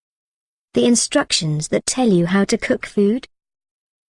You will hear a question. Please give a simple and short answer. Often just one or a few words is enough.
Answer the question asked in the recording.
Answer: Recipe